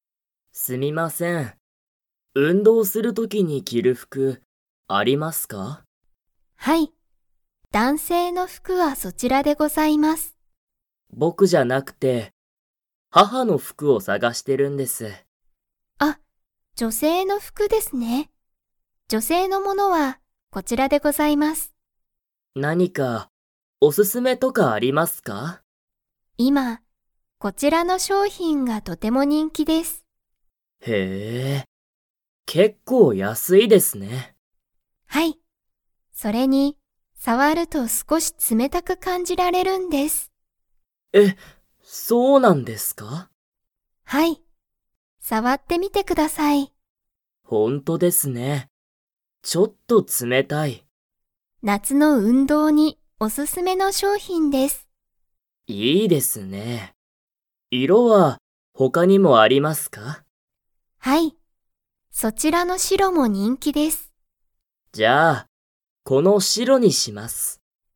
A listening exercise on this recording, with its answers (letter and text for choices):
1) お客きゃくさんは、男性だんせいの服ふくを____。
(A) 探さがしている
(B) 探さがしていない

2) その商品しょうひんは、触さわると____感かんじられる。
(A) 人気にんきに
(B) おすすめに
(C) 冷つめたく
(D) 安やすく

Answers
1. (B) 探さがしていない
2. (C) 冷つめたく

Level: Level 4